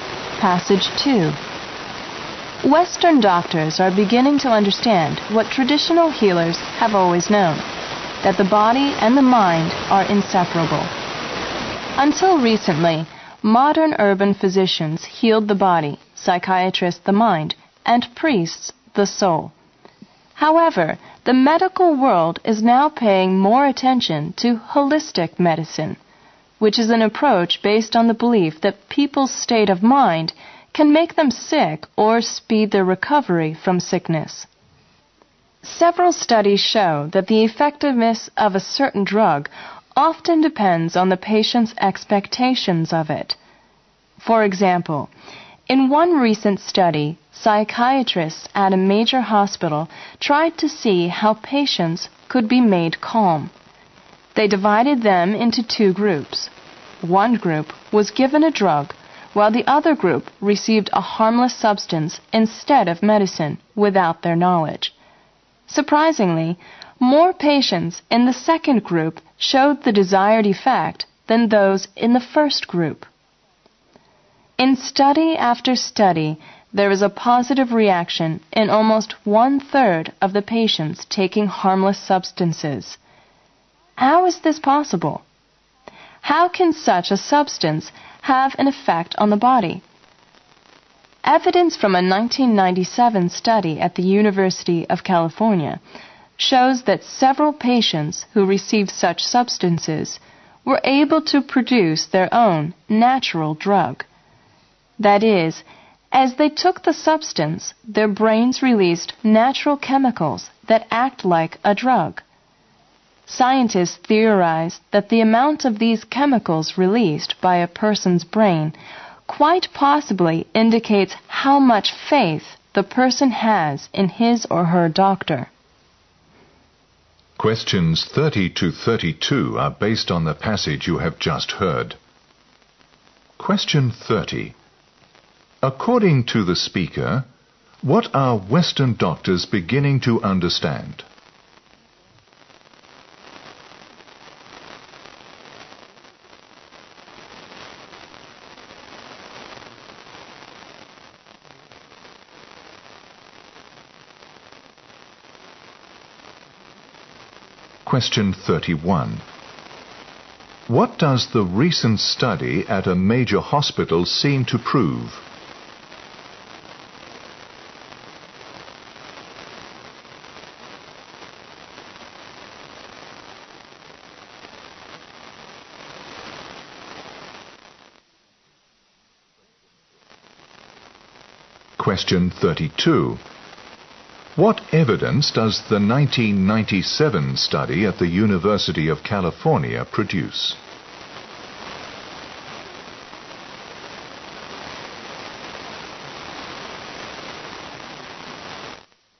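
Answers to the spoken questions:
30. The body and the mind are inseparable
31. A drug's effect depends on the patient's expectations of it
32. Some patients given harmless substances produced their own natural drug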